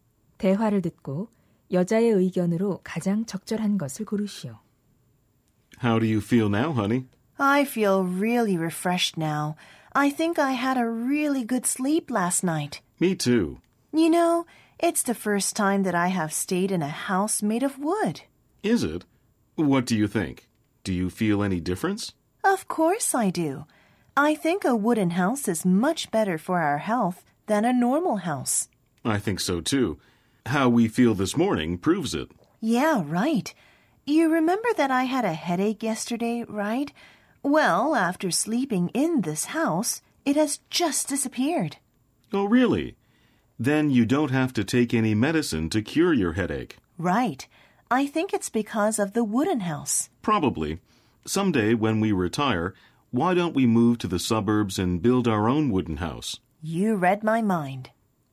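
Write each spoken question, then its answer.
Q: 대화를 듣고 여자의 의견으로 가장 적절한 것을 고르시오.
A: 나무로 지은 집이 일반 집보다 건강에 더 좋다.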